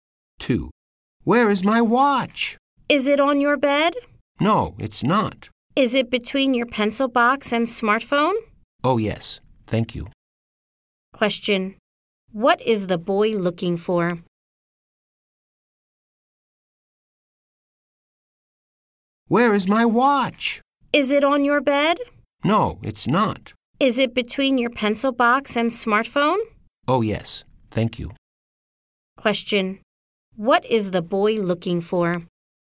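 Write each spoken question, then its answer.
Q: What is the boy looking for?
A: His watch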